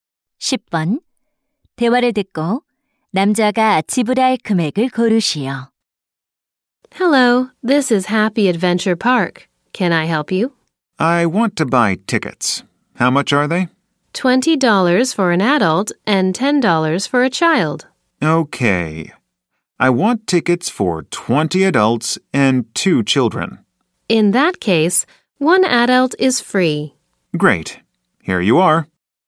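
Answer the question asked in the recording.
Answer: 400달러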